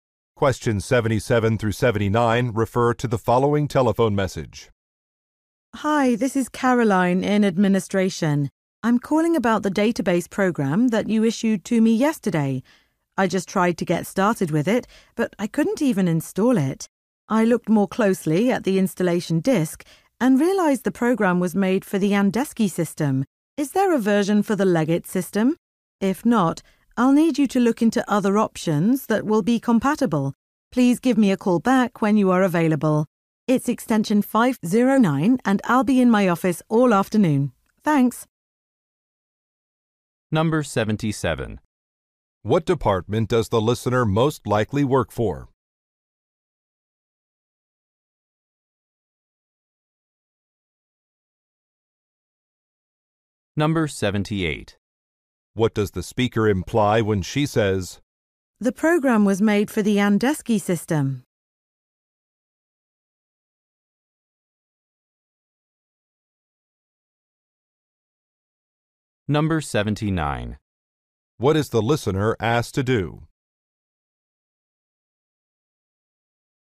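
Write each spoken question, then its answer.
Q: What does the speaker imply when she says,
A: The program is incompatible with her system

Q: What is the listener asked to do?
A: Call her back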